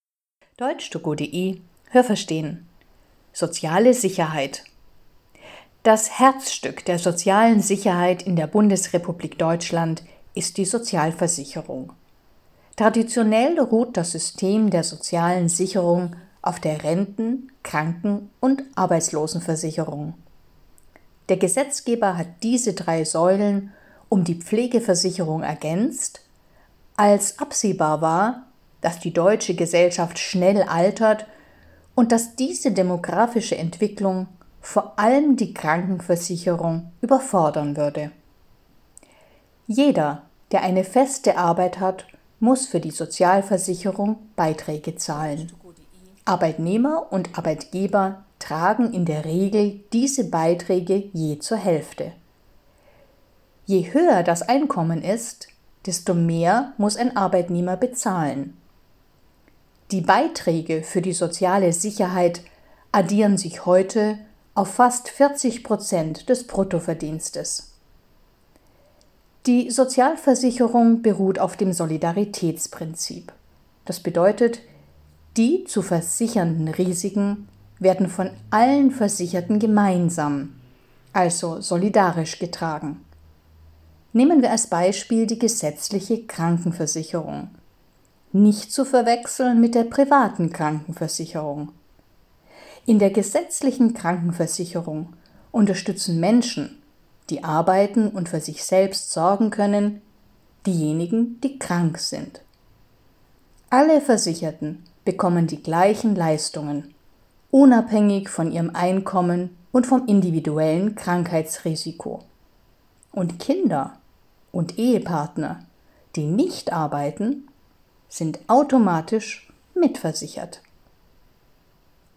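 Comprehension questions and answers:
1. Renten-, Kranken- und Arbeitslosenversicherung sind traditionell die drei wesentlichen Bestandteile der deutschen Sozialversicherung.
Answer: richtig

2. Es gibt heute noch eine weitere Säule, nämlich die Pflegeversicherung.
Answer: richtig

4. Die Höhe des Sozialversicherungsbeitrags richtet sich nach dem Einkommen und die Arbeitgeber können entscheiden, ob sie die Hälfte übernehmen.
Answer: falsch

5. Die Sozialversicherungsbeiträge betragen bei einem normalverdienenden Arbeitnehmer 14 Prozent des Bruttolohns.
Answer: falsch

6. In der privaten Krankenversicherung bekommen alle Versicherten die gleichen Leistungen, egal, wie viel sie verdienen und egal, welches Krankheitsrisiko sie haben.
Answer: falsch

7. Wenn es in einer Familie nur einen Hauptverdiener gibt, der in die gesetzliche Krankenkasse einzahlt, dann sind alle anderen Familienmitglieder automatisch mitversichert.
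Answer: richtig

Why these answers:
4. Das Gesetz schreibt vor, dass die Arbeitgeber die Hälfte übernehmen.
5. Es sind circa 40 Prozent des Bruttolohns.
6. Diese Konditionen gelten nicht bei privaten Krankenversicherungen. Sie gelten nur bei der gesetzlichen Krankenversicherung, die nach dem Solidaritätsprinzip funktioniert.

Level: Hörtexte C (schwer)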